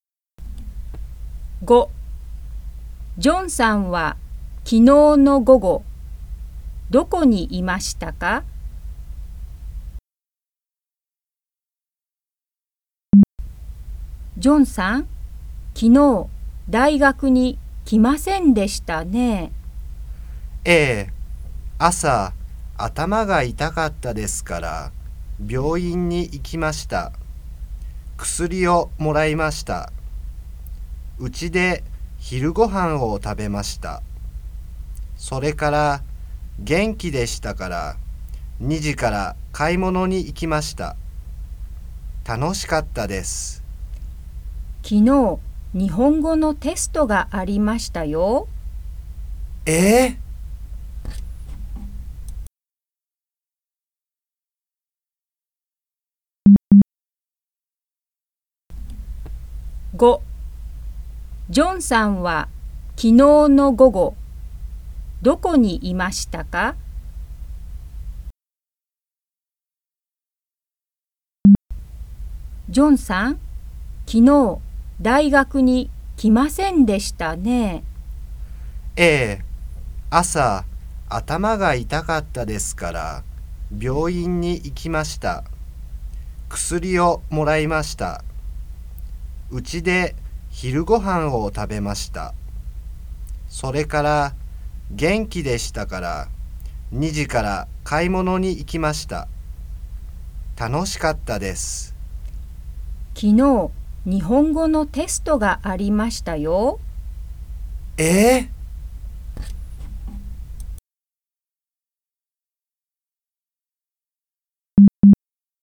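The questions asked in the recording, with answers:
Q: ジョンさんは昨日の午後、どこにいましたか?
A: 買い物に行っていた(店)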